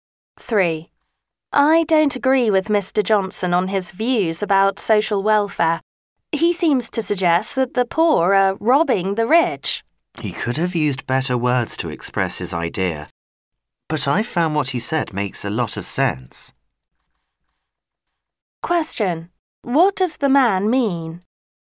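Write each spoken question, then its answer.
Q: What does the man mean?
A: He agrees with Mr. Johnson's ideas, though Johnson could have used better words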